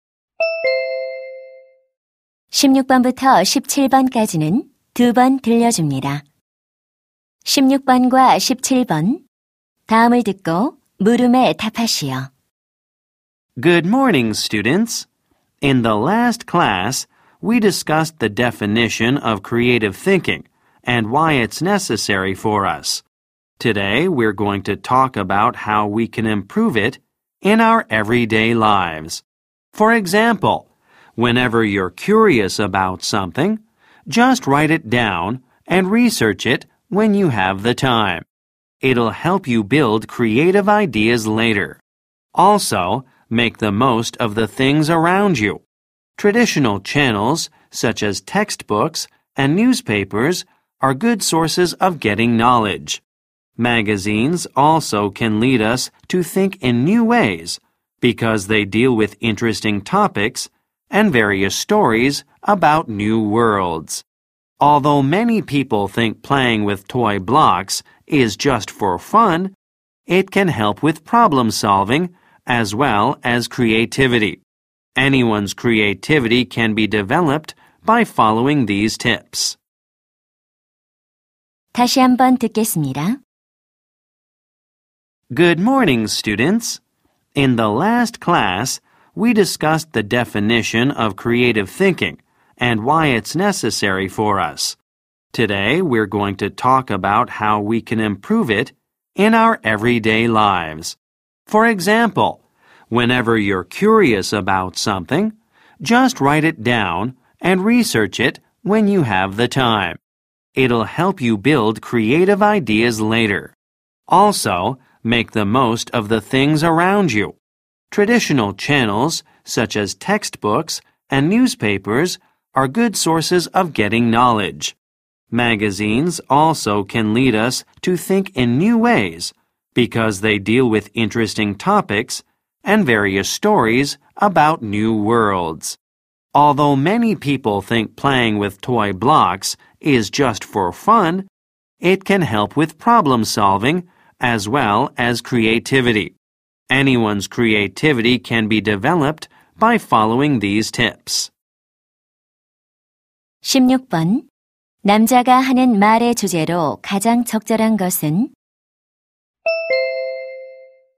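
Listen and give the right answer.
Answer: 일상생활에서 창의력을 향상시키는 방법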